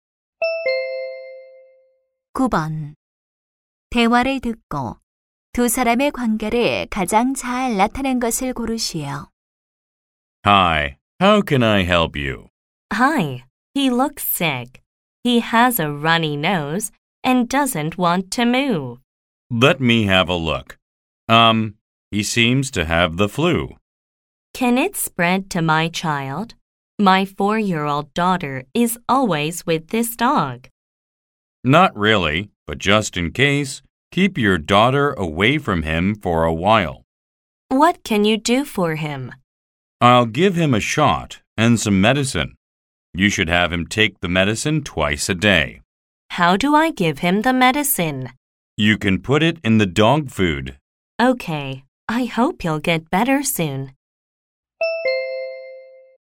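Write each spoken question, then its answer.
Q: 대화를 듣고 두 사람의 관계를 가장 잘 나타낸 것을 고르시오.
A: 수의사 - 개 주인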